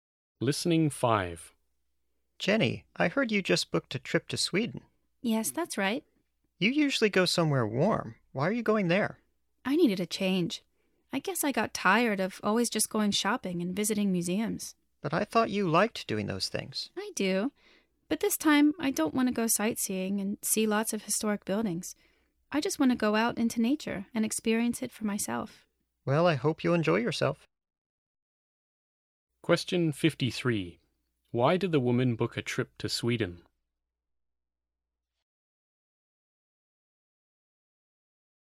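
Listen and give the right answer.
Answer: To go out into nature and experience it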